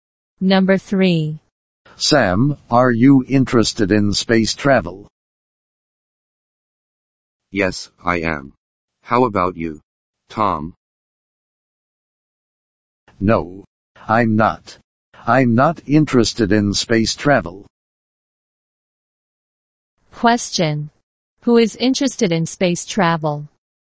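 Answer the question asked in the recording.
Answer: Sam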